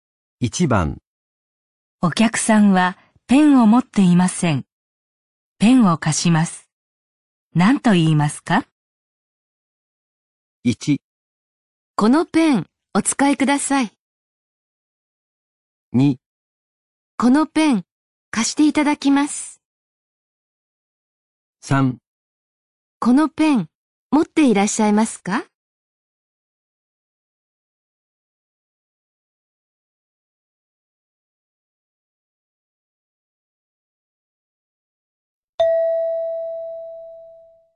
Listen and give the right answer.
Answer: 1

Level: N3 Listening · Test 12